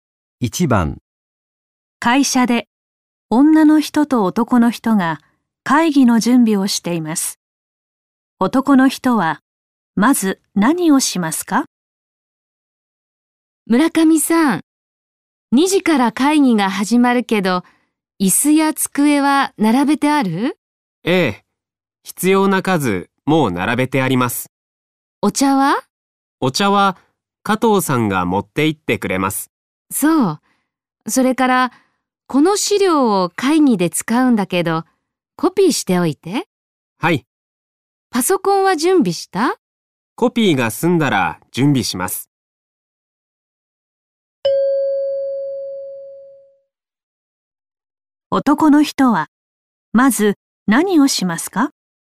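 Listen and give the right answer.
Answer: 資料をコピーする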